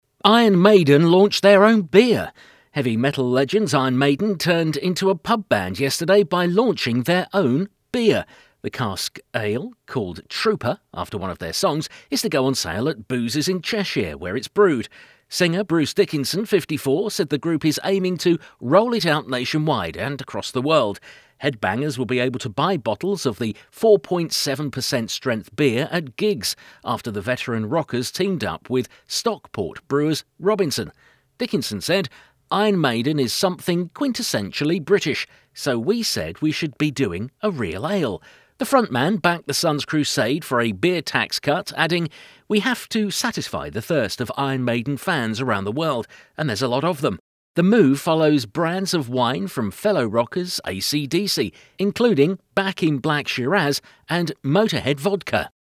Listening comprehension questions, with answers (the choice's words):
After listening to the article, decide whether the statements are TRUE or FALSE.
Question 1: Iron Maiden opened a pub yesterday.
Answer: FALSE

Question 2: They named their beer after one of their songs.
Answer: TRUE

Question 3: Only headbangers will be able to buy this special beer.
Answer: FALSE

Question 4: Other bands have brewed beer.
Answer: FALSE

Now try to fill in the gaps by choosing the right word from the list below.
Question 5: Heavy metal 1) .......... Iron Maiden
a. icons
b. legends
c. bandmen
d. gentlemen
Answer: legends

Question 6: turned into a pub 2) .......... yesterday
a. gang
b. brand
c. band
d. stand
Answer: band

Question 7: by launching their 3) .......... beer.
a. shown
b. brown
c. own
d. strong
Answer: own

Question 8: Headbangers will be 4) .......... to buy bottles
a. able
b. cable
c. maybe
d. table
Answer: able

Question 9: of the 4.7 per cent 5) .......... beer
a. strength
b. strong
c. length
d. power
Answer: strength

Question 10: beer at 6) .......... after the veteran rockers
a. figs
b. pubs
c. shows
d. gigs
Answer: gigs

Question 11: 7) ........... up with Stockport brewers Robinson.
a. steamed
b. membered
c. cleaned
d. teamed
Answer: teamed

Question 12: "We have to 8) .......... the thirst of Iron Maiden fans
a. satisfy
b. set high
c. sanctify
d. signify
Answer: satisfy

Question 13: The move follows 9) .......... of wine from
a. trademarks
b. brands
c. bands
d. types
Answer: brands

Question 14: 10).......... rockers AC/DC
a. fellow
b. mellow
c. friend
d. follow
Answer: fellow

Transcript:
Heavy metal legends Iron Maiden turned into a pub band yesterday — by launching their own beer. The cask ale — called Trooper after one of their songs — is to go on sale at boozers in Cheshire, where it is brewed. Singer Bruce Dickinson, 54, said the group is aiming to roll it out nationwide and across the world. Headbangers will be able to buy bottles of the 4.7 per cent strength beer at gigs after the veteran rockers teamed up with Stockport brewers Robinson. Dickinson said: "Iron Maiden is something quintessentially British — so we said we should be doing a real ale." The frontman backed The Sun's crusade for a beer tax cut, adding: "We have to satisfy the thirst of Iron Maiden fans around the world — and there's a lot of them." The move follows brands of wine from fellow rockers AC/DC — including Back in Black Shiraz — and Motorhead Vodka.